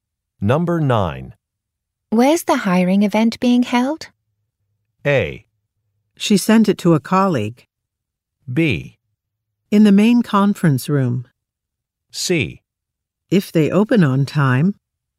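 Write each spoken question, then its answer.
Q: Where's the hiring event being held?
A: B: In the main conference room.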